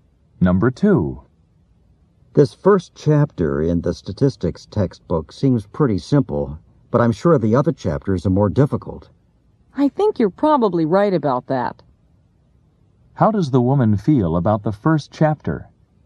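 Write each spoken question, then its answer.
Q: How does the woman feel about the first chapter?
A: She agrees it's simple and later chapters will be harder.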